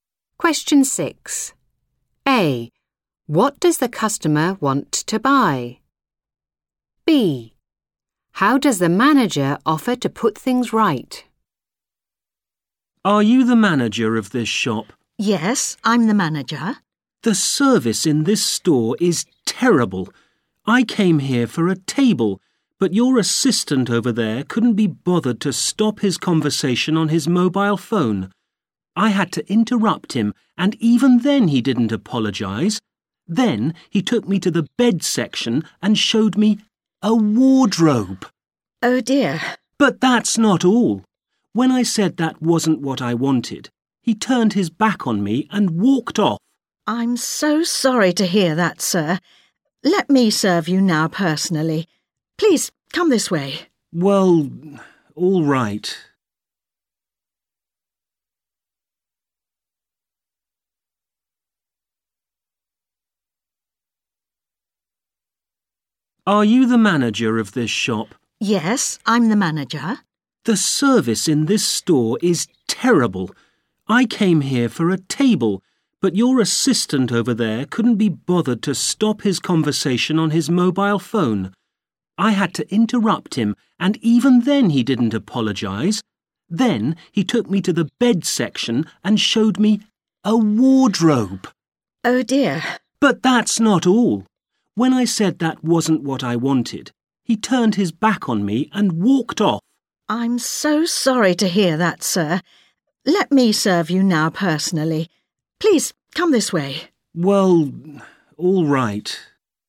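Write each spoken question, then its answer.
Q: What does the customer want to buy?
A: A table

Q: How does the manager offer to put things right?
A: By serving him personally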